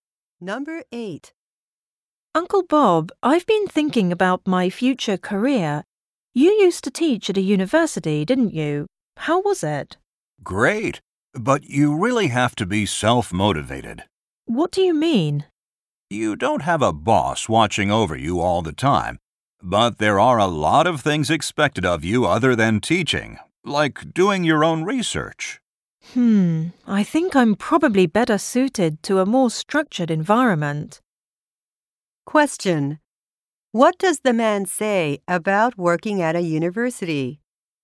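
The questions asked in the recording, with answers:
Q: What does the man say about working at a university?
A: You need to be self-motivated, and a lot is expected of you besides teaching, such as research.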